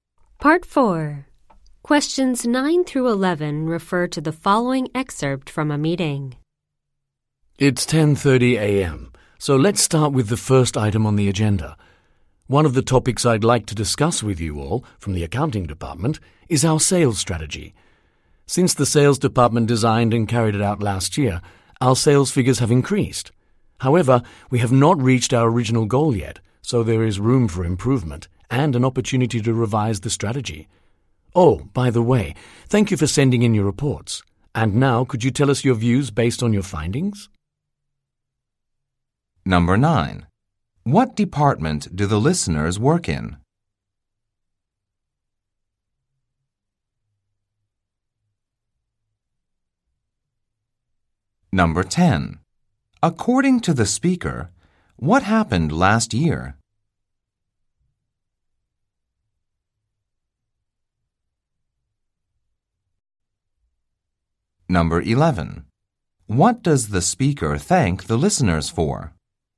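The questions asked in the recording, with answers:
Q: According to the speaker, what happened last year?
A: The sales department designed and carried out a sales strategy, and sales figures increased

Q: What does the speaker thank the listeners for?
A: Sending in their reports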